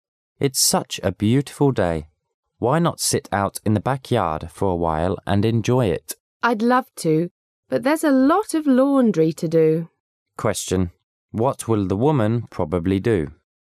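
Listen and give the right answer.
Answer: Do the laundry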